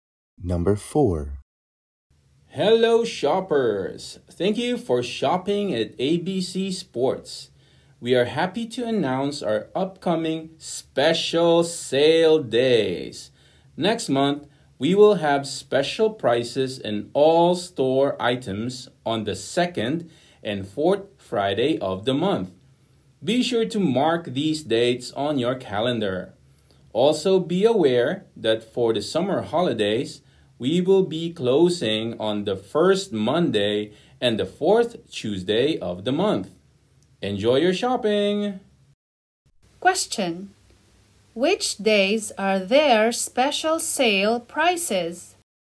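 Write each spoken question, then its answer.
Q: Question: which days are there special sale prices?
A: The 2nd and 4th Friday of next month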